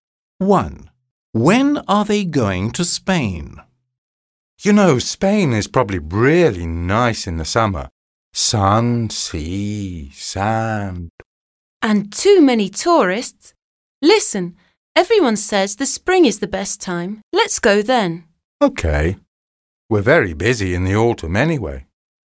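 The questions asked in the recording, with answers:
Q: When are they going to Spain?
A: In the spring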